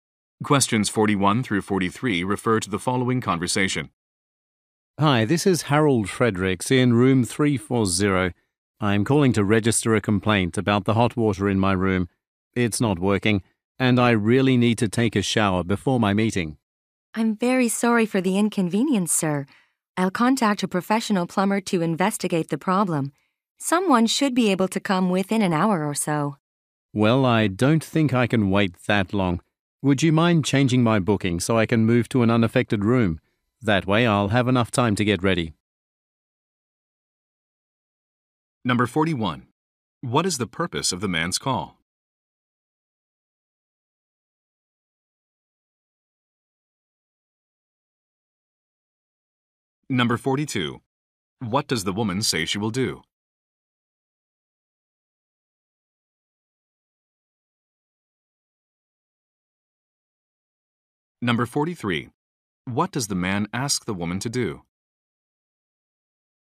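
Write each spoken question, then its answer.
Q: What is the purpose of the man's call?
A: To complain that the hot water in his room isn't working

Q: What does the woman say she will do?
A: Contact a plumber

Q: What does the man ask the woman to do?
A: Move him to a different room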